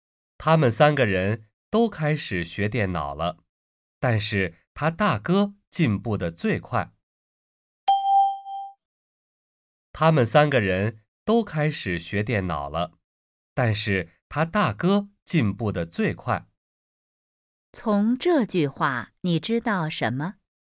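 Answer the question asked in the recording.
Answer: 他们三个人都开始学电脑了,他大哥进步得最快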